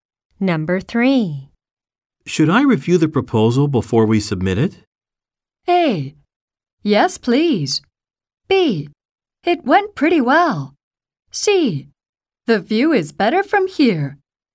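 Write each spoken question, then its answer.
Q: Should I review the proposal before we submit it?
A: A: Yes, please.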